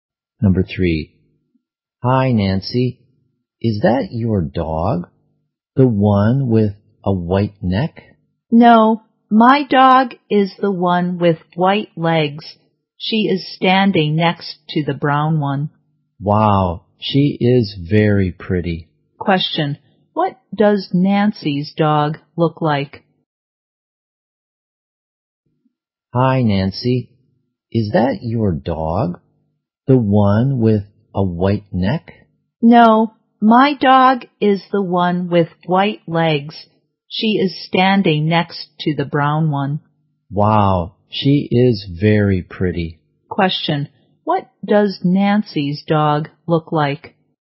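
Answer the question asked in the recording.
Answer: It has white legs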